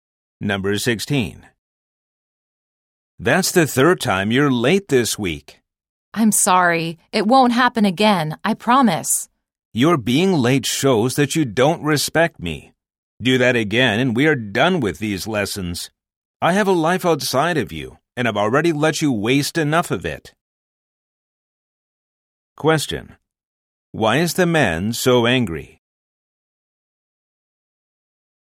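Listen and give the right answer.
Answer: The student has been late for the third time this week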